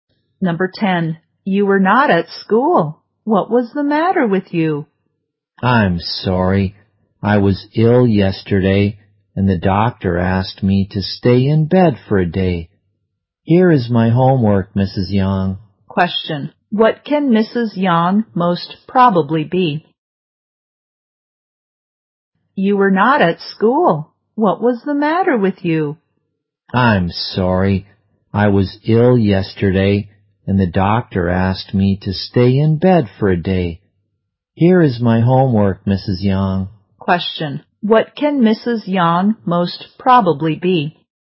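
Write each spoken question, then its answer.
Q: What can Mrs. Yang most probably be?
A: A teacher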